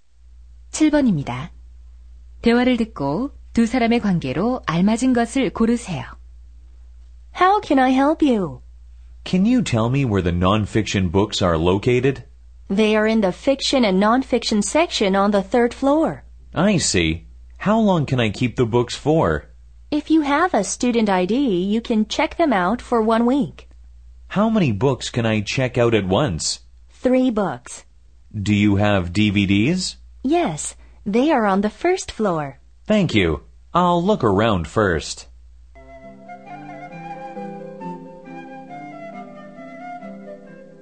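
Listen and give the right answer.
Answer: 도서관 사서와 이용자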